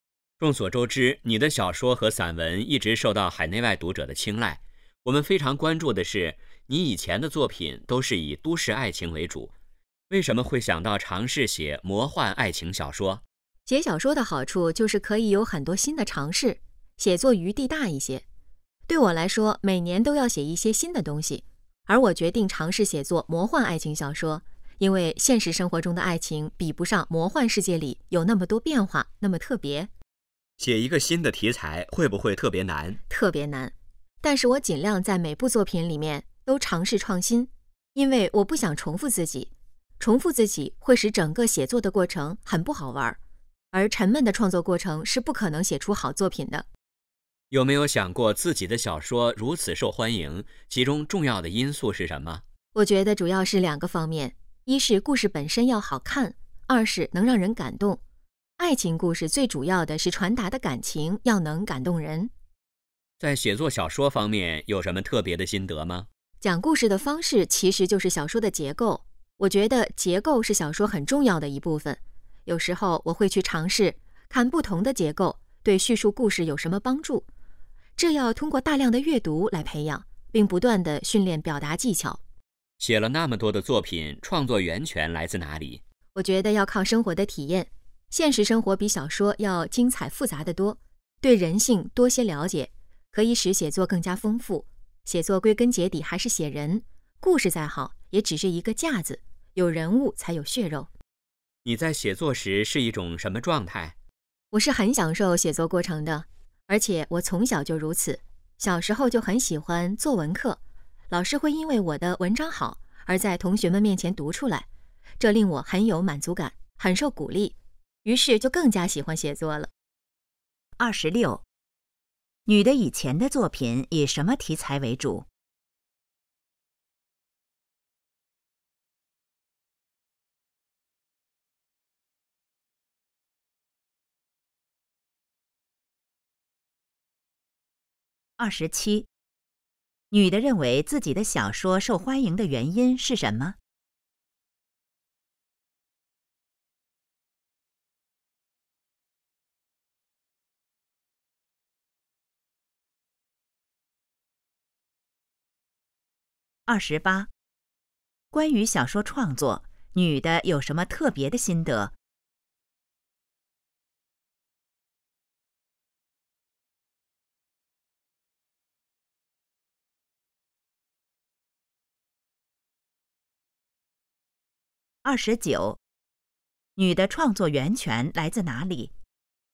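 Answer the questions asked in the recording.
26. 都市爱情
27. 故事好看,能让人感动
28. 结构是小说很重要的一部分
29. 生活的体验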